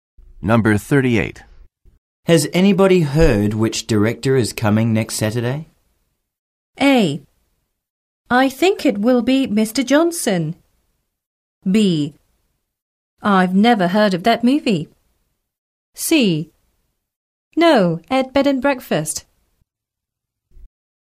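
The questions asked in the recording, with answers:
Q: Has anybody heard which director is coming next Saturday?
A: A: I think it will be Mr. Johnson.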